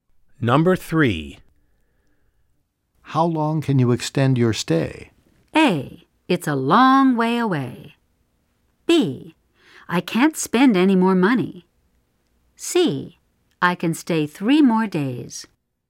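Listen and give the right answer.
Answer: C: I can stay 3 more days.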